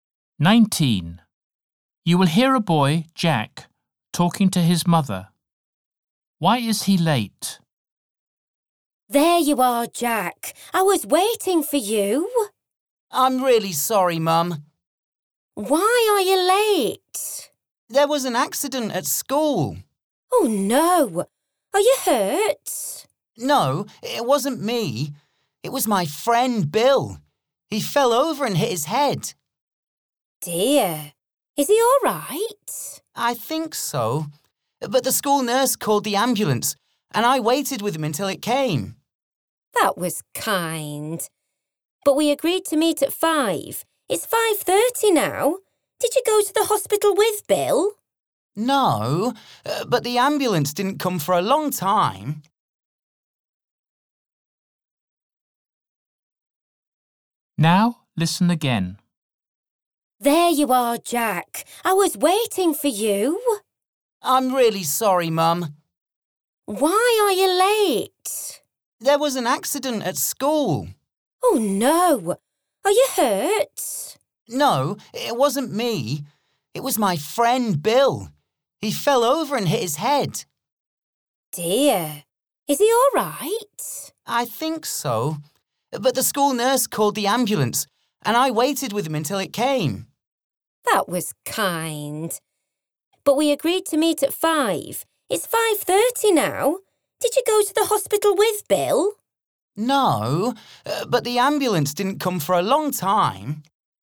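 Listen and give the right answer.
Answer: he waited with his hurt friend for the ambulance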